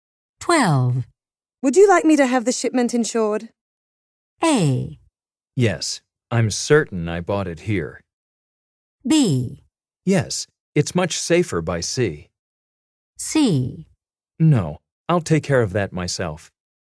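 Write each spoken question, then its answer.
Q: Would you like me to have the shipment insured?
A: C: No, I'll take care of that myself.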